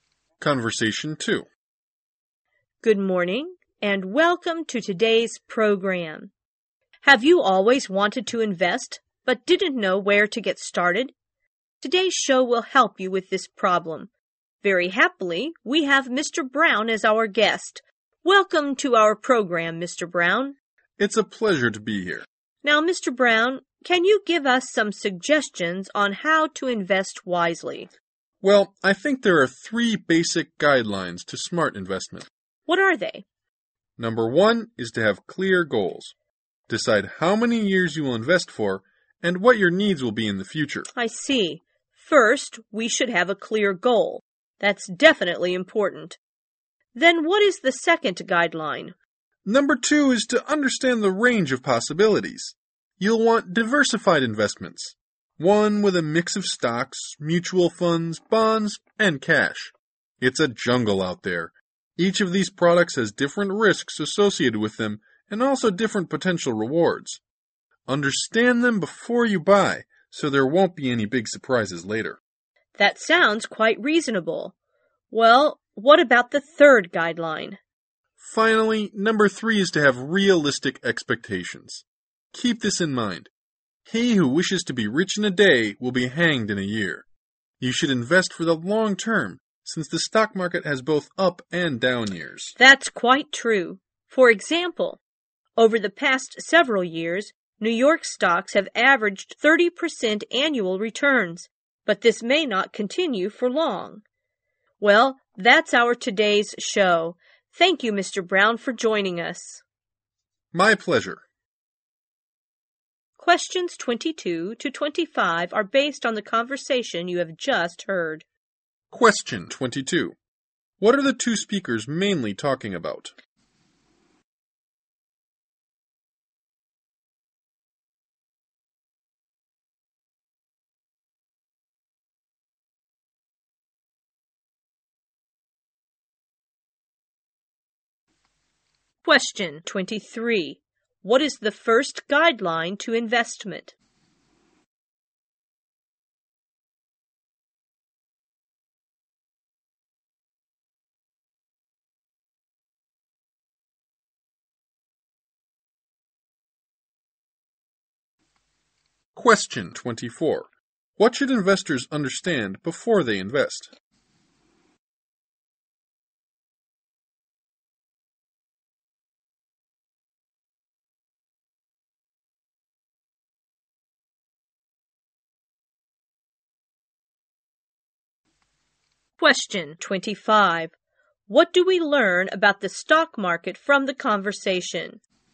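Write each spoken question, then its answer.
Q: What are the two speakers mainly talking about?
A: How to invest wisely

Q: What is the first guideline to investment?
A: Have clear goals

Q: What should investors understand before they invest?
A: The range of possibilities: the risks and rewards of each product

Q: What do we learn about the stock market from the conversation?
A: It has both up and down years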